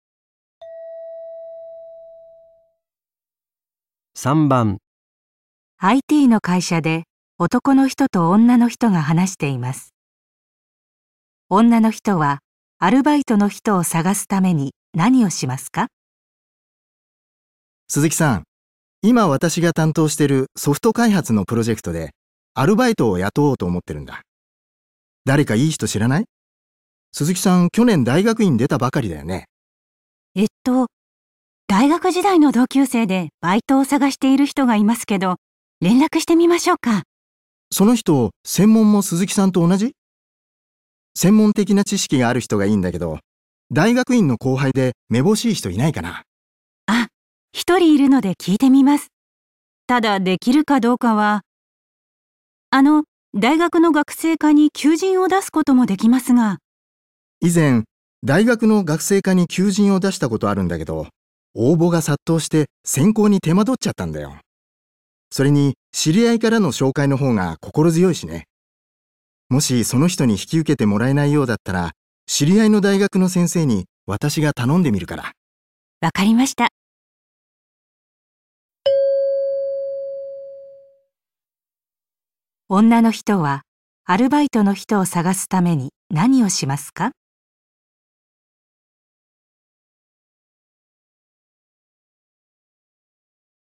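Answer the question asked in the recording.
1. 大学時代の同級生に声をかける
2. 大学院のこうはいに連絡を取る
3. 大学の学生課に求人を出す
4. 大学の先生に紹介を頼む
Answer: 2. 大学院のこうはいに連絡を取る

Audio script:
ITの会社で男の人と女の人が話しています。女の人はアルバイトの人を探すために何をしますか。
男:鈴木さん、今私が担当してるソフト開発のプロジェクトでアルバイトを雇おうと思ってるんだ。誰かいい人知らない?鈴木さん、 去年大学院出たばかりだよね?
女 : えっと、大学時代の同級生でバイトを探している人がいますけど、連絡してみましょうか。
男:その人、 専門も鈴木さんと同じ? 専門的な知識がある人がいいんだけど、 大学院の後輩で目ぼしい人いないかな?
女 : ああ、1人いるので聞いてみます。ただ、できるかどうかは・・・。 あの、 大学の学生課に求人を出すこともで きますが・・・。
男:以前、大学の学生課に求人を出したことあるんだけど、 応募が殺到して選考に手間取っちゃったんだよ。それに、知り合いからの紹介の方が心強いしね。 もしその人に引き受けてもらえないようだったら、知り合いの大学の先生に私が頼んでみるから。
女:わかりました。

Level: N1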